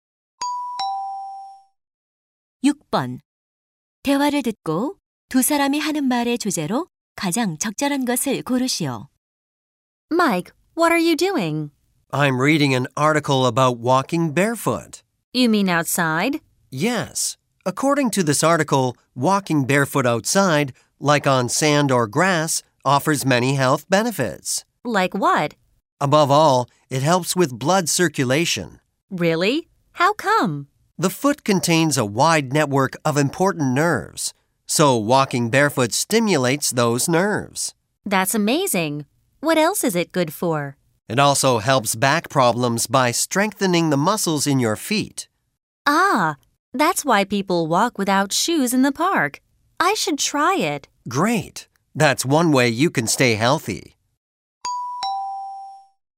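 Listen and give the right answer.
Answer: 맨발 걷기의 건강상 이점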